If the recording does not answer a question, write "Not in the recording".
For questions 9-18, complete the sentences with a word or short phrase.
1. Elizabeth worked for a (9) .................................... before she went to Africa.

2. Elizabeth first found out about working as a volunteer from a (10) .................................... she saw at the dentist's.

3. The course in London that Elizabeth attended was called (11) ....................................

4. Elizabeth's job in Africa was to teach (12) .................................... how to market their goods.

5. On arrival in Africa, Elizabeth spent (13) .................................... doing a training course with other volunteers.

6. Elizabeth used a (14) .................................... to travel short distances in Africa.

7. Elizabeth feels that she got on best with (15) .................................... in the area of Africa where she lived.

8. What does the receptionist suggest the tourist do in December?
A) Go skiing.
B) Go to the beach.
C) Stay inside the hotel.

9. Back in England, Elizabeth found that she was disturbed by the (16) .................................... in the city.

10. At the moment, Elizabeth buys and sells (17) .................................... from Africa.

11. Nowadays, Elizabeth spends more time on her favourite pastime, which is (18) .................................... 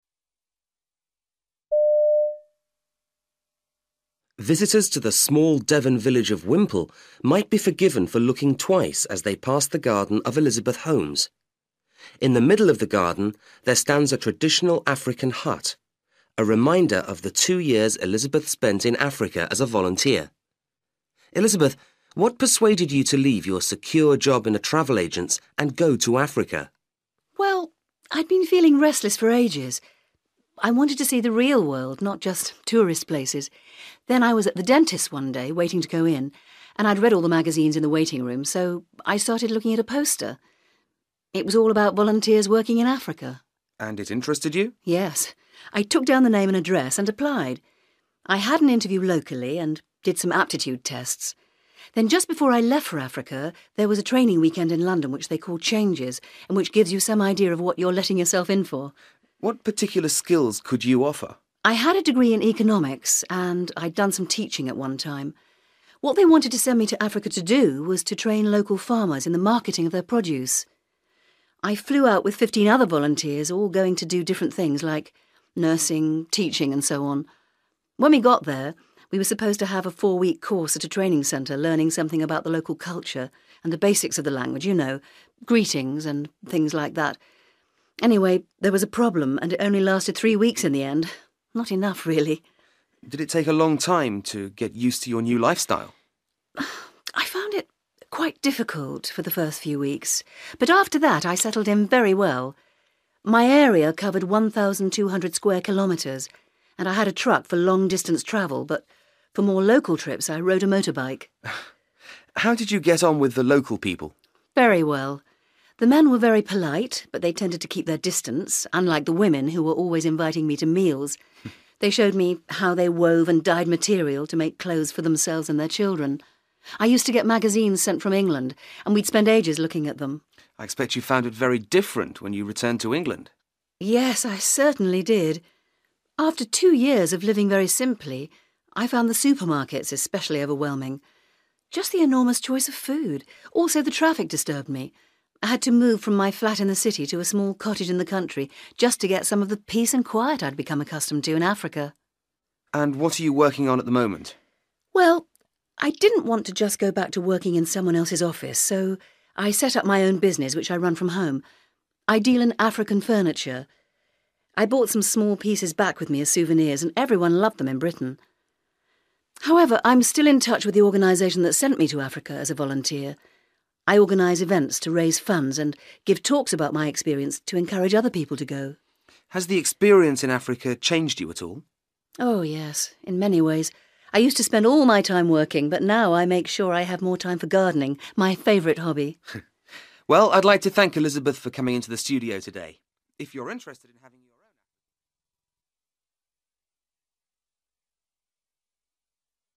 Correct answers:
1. travel agent('s) / travel agency
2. poster
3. Changes
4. (local) (African) farmers
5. three / 3 weeks
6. motorbike / motorcycle
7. (the) (local) women
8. Not in the recording
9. traffic (noise)
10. (piece of) furniture
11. gardening

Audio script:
Interviewer: Visitors to the small Devon village of Whimple might be forgiven for looking twice as they pass the garden of Elizabeth Holmes. In the middle of the garden there stands a traditional African hut, a reminder of the two years Elizabeth spent in Africa as a volunteer. Elizabeth, what persuaded you to leave your secure job in a travel agent's and go to Africa?
Elizabeth: Well, I'd been feeling restless for ages. I wanted to see the real world, not just tourist places. Then, I was at the dentist's one day, waiting to go in, and I'd read all the magazines in the waiting room, so I started looking at a poster – it was all about volunteers working in Africa.
Interviewer: And it interested you?
Elizabeth: Yes, I took down the name and address and applied. I had an interview locally and did some aptitude tests. Then just before I left for Africa, there was a training weekend in London, which they call 'Changes' and which gives you some idea of what you're letting yourself in for.
Interviewer: What particular skills could you offer?
Elizabeth: I had a degree in economics and I had done some teaching at one time. What they wanted to send me to Africa to do was to train local farmers in the marketing of their produce. I flew out with fifteen other volunteers, all going to do different things, like nursing, teaching, and so on. When we got there, we were supposed to have a four-week course at a training centre learning something about the local culture and the basics of the language – you know, greetings and things like that. Anyway, there was a problem and it only lasted three weeks in the end – not enough really.
Interviewer: Did it take a long time to get used to your new lifestyle?
Elizabeth: I found it quite difficult for the first few weeks, but after that I settled in very well. My area covered 1200 square kilometres, and I had a truck for long-distance travel, but for more local trips I rode a motorbike.
Interviewer: How did you get on with the local people?
Elizabeth: Very well. The men were very polite but they tended to keep their distance – unlike the women, who were always inviting me to meals. They showed me how they wove and dyed material to make clothes for themselves and their children. I used to get magazines sent from England and we'd spend ages looking at them.
Interviewer: I expect you found it very different when you returned to England?
Elizabeth: Yes, I certainly did. After two years of living very simply, I found the supermarkets especially overwhelming – just the enormous choice of food. Also, the traffic disturbed me. I had to move from my flat in the city to a small cottage in the country just to get some of the peace and quiet I'd become accustomed to in Africa.
Interviewer: And what are you working on at the moment?
Elizabeth: Well, I didn't want to just go back to working in someone else's office so I set up my own business, which I run from home. I deal in African furniture. I brought some small pieces back with me as souvenirs and everyone loved them in Britain. However, I'm still in touch with the organisation that sent me to Africa as a volunteer. I organise events to raise funds and give talks about my experience to encourage other people to go.
Interviewer: Has the experience in Africa changed you at all?
Elizabeth: Oh yes, in many ways. I used to spend all my time working, but now I make sure I have more time for gardening – my favourite hobby.
Interviewer: Well, I'd like to thank Elizabeth for coming into the studio today. If you're interested in ...